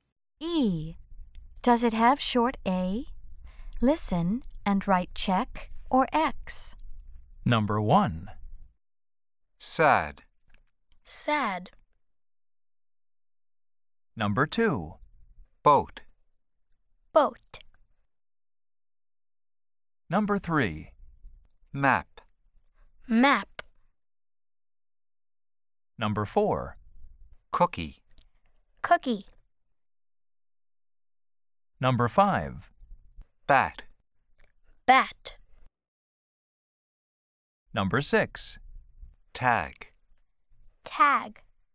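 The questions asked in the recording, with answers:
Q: Boat.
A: X (no short A)

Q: Cookie.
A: X (no short A)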